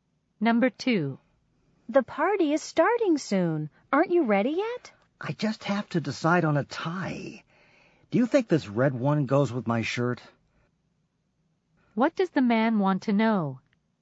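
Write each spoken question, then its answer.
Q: What does the man want to know?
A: Whether the red tie goes with his shirt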